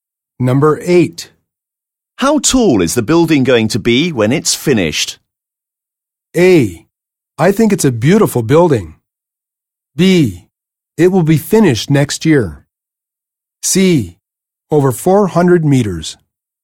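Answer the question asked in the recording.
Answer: C: Over 400 meters.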